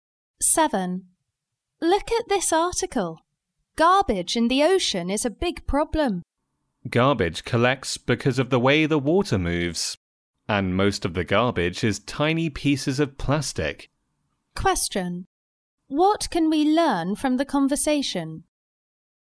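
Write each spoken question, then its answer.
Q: What can we learn from the conversation?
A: Most of the garbage in the ocean is tiny pieces of plastic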